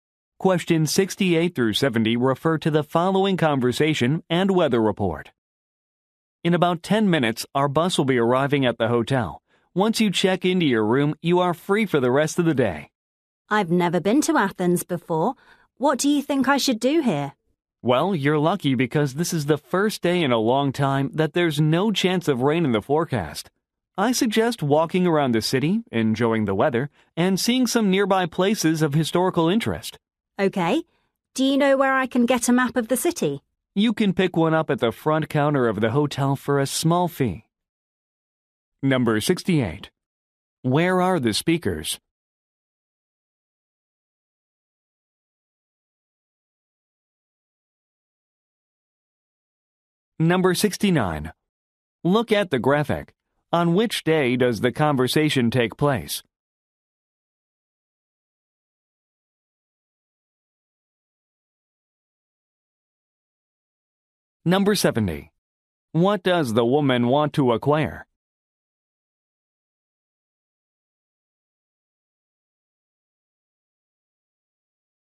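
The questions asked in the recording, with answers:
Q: Where are the speakers?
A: On a bus in Athens

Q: What does the woman want to acquire?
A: A map of the city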